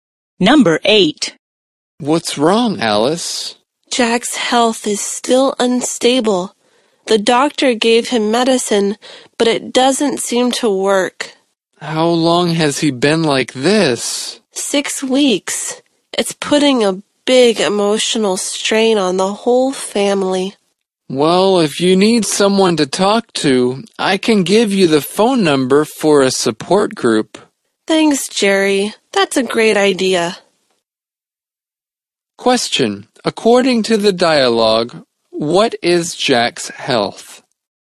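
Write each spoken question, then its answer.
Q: According to the dialogue, what is Jack's health?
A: Still unstable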